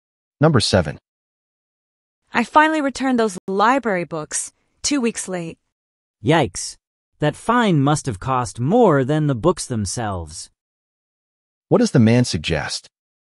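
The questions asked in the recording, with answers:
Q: What does the man suggest?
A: The late fine was very expensive.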